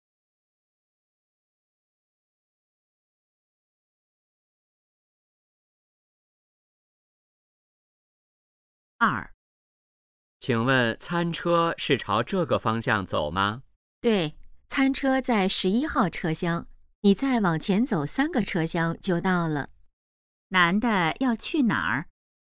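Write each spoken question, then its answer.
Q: 男的要去哪儿?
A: 餐车(11号车厢)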